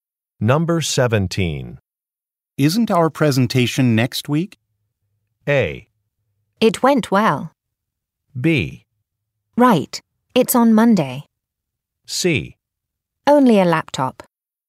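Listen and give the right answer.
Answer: B: Right. It's on Monday.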